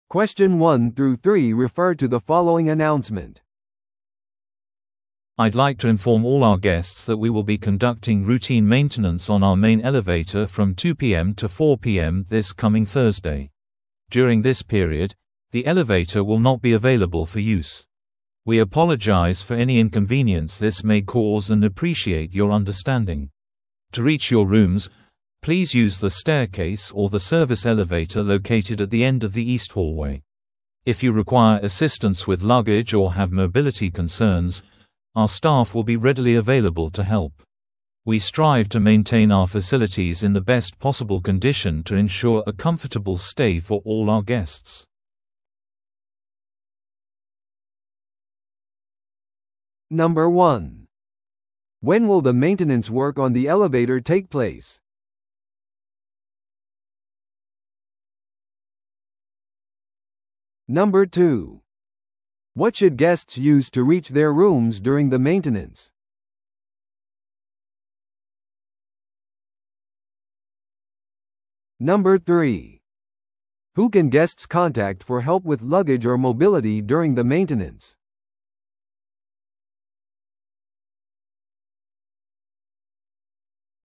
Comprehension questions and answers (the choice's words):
Listen to the audio below and answer the questions.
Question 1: When will the maintenance work on the elevator take place?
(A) 水曜日の2pmから4pmまで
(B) 木曜日の3pmから5pmまで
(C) 木曜日の2pmから4pmまで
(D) 金曜日の2pmから4pmまで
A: 木曜日の2pmから4pmまで

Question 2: What should guests use to reach their rooms during the maintenance?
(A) メインのエレベーター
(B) 階段またはサービスエレベーター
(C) エスカレーター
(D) フロントに電話をする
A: 階段またはサービスエレベーター

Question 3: Who can guests contact for help with luggage or mobility during the maintenance?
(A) 外部の業者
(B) ホテルの警備員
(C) フロント係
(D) ホテルスタッフ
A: ホテルスタッフ

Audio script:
I'd like to inform all our guests that we will be conducting routine maintenance on our main elevator from 2pm to 4pm this coming Thursday. During this period, the elevator will not be available for use. We apologize for any inconvenience this may cause and appreciate your understanding. To reach your rooms, please use the staircase or the service elevator located at the end of the east hallway. If you require assistance with luggage or have mobility concerns, our staff will be readily available to help. We strive to maintain our facilities in the best possible condition to ensure a comfortable stay for all our guests.